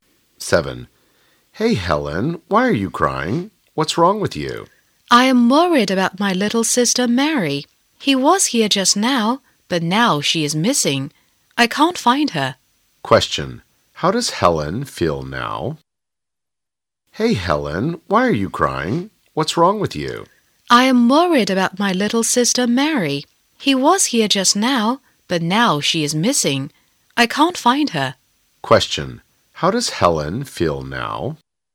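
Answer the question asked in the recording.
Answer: Worried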